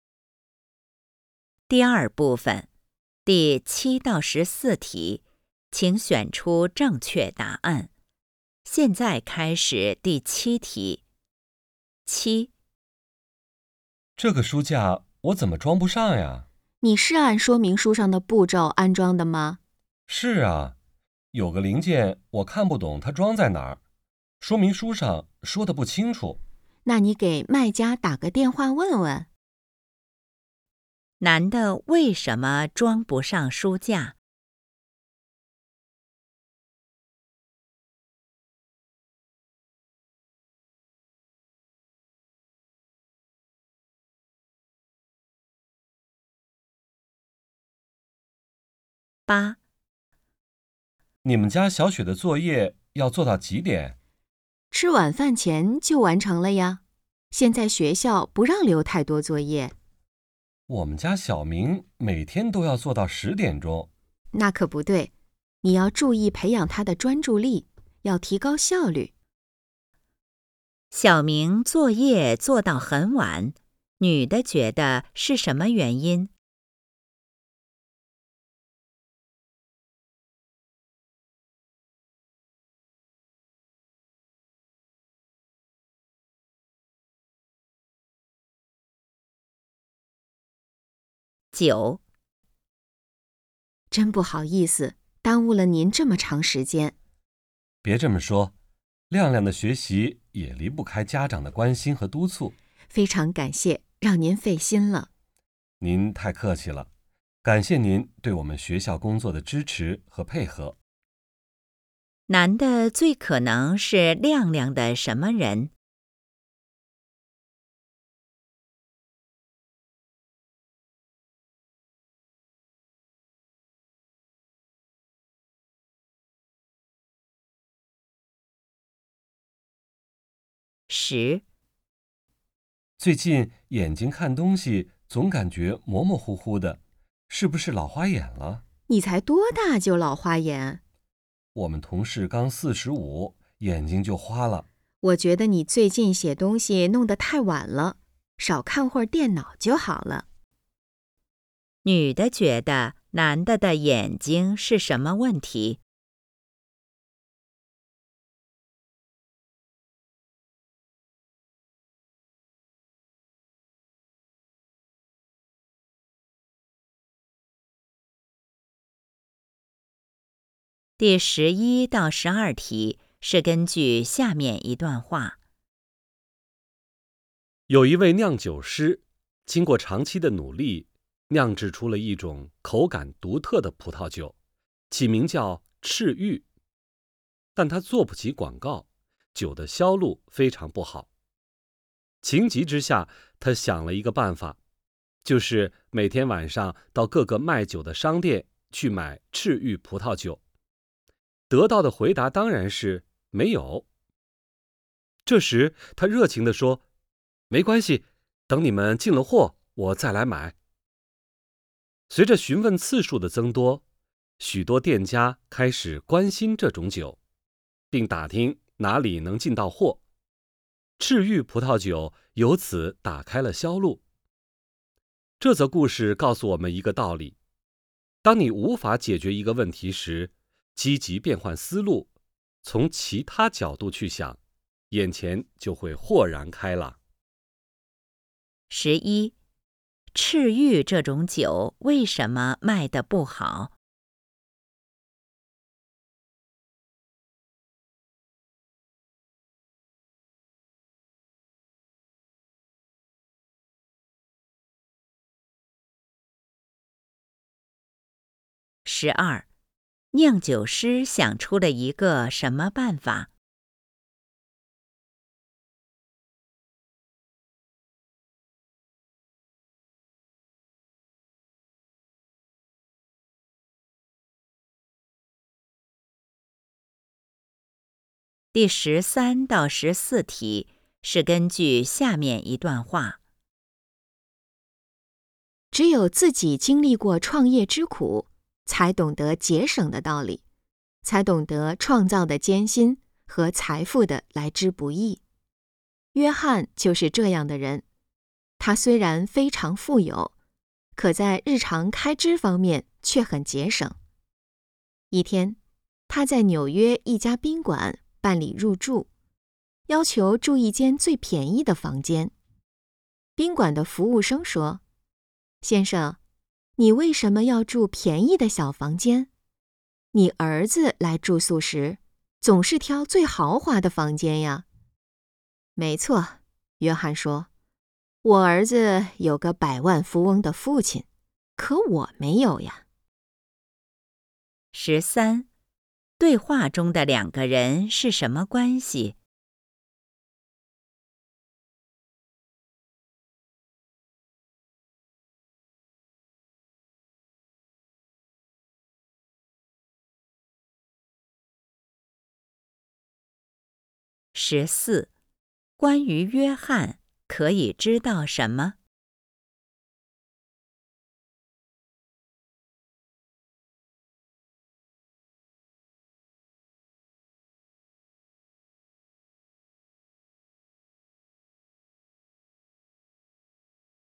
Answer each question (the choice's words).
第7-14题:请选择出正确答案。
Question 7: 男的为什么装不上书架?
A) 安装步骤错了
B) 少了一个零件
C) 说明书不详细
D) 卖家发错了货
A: 说明书不详细

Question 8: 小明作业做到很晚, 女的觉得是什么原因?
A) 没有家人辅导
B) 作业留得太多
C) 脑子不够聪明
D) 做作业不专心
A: 做作业不专心

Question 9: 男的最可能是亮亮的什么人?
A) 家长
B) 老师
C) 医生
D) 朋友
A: 老师

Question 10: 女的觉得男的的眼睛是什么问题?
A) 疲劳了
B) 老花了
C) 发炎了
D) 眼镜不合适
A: 疲劳了

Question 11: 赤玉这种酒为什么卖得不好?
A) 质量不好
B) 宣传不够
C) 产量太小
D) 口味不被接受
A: 宣传不够

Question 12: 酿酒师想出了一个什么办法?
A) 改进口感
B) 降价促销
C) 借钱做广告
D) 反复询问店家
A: 反复询问店家

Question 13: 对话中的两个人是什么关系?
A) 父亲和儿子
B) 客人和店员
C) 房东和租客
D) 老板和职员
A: 客人和店员

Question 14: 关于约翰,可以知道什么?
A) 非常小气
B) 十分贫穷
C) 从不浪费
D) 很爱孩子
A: 从不浪费

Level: HSK 5